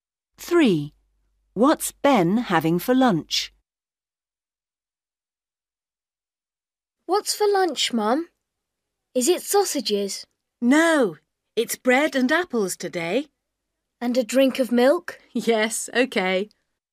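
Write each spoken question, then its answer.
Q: What's Ben having for lunch?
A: Bread and apples and milk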